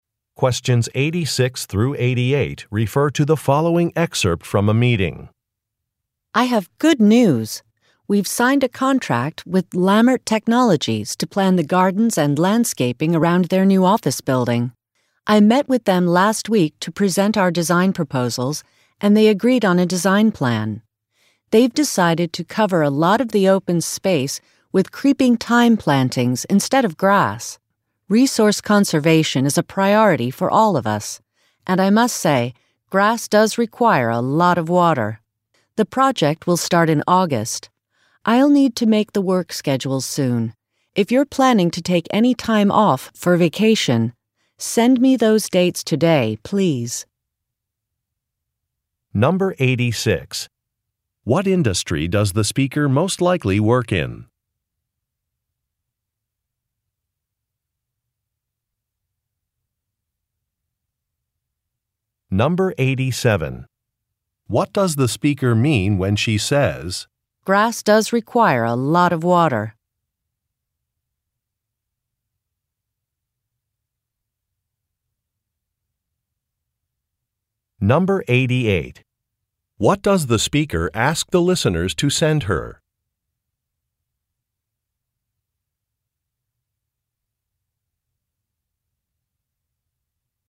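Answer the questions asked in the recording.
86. Landscaping
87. She agrees with the client's choice of thyme instead of grass because it saves water
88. Their vacation dates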